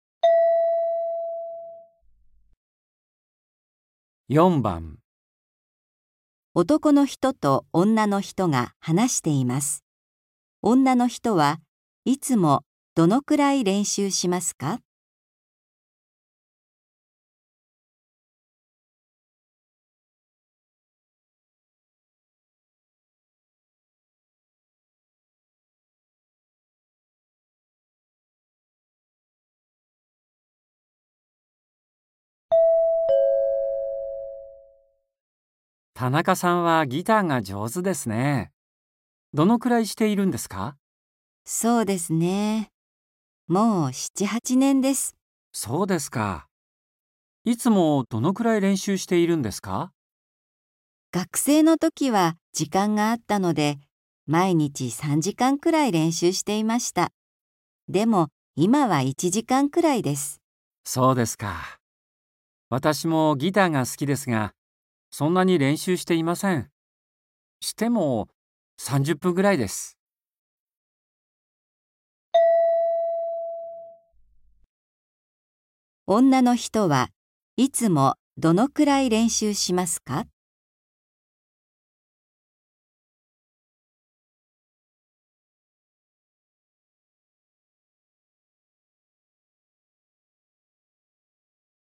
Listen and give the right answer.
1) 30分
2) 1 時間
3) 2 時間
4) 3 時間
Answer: 2) 1 時間

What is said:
M:田中さんはギターが上手ですね。どのくらいしているんですか。
M:そうですか。いつもどれくらい練習しているんですか。
F:学生のときは時間があったので、毎日3時間くらい練習していました。でも、今は1時間くらいです。
M:そうですか。私もギターが好きですが、そんなに練習をしていません。しても、30分くらいです。

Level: 初級